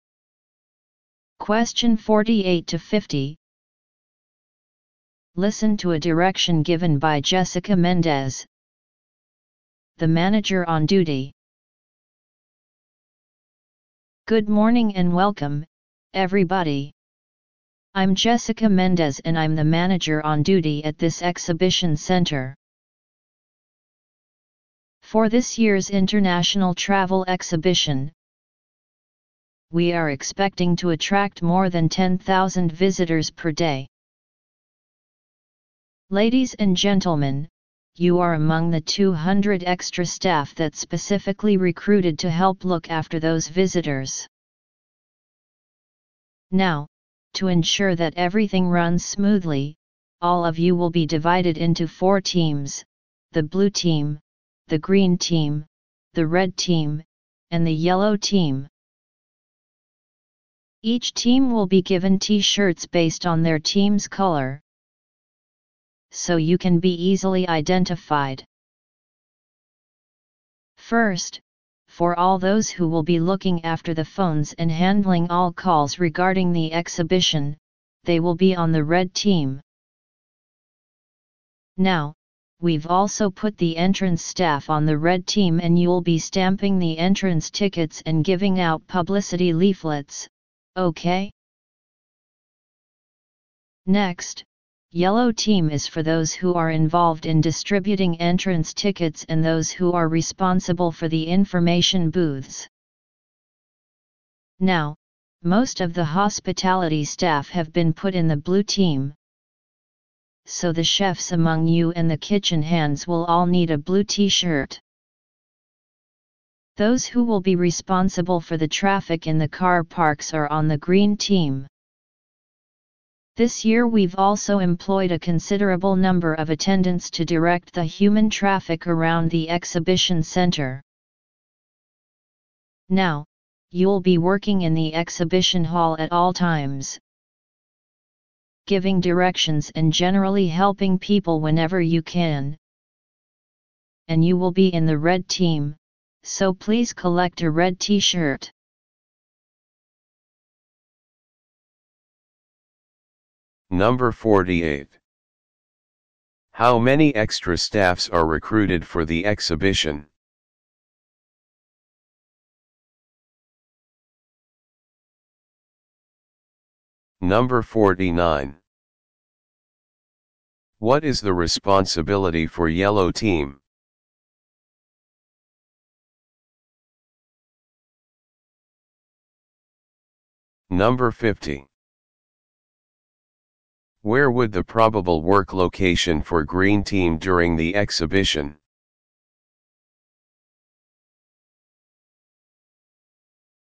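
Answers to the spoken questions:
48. 200
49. Distributing entrance tickets and running the information booths
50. In the car parks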